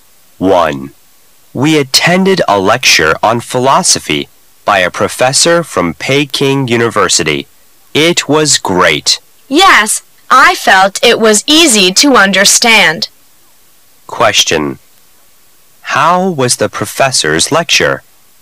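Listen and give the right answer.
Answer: Great and easy to understand

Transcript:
[解析] M: We attended a lecture on philosophy by a professor from Peking University. It was great. W: Yes, I felt it was easy to understand. Q: How was the professor's lecture?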